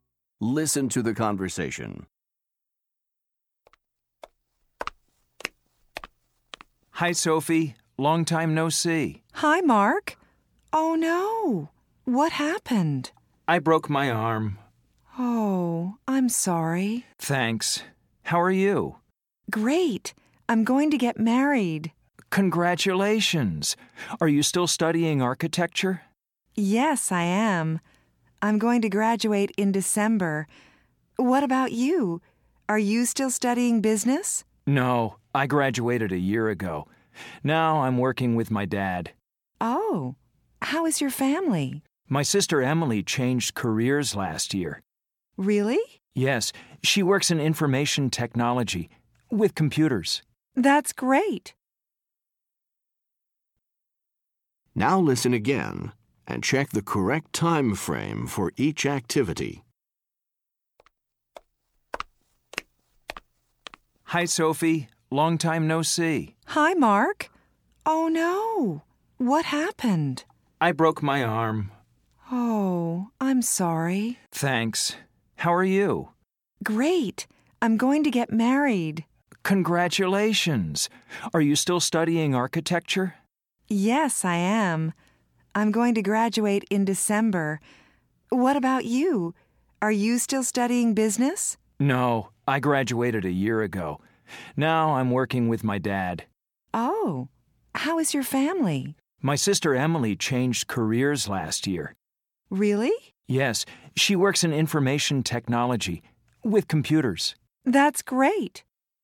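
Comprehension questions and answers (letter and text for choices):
Listen to the conversation. Then listen again and choose the correct time of the event in the chart.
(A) past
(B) present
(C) future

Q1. Sophie—get married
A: (C) future

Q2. Sophie—study architecture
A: (B) present

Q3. Sophie—graduate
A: (C) future

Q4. Mark—graduate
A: (A) past

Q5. Mark—work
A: (B) present

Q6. Emily—change careers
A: (A) past

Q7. Emily—work in information technology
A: (B) present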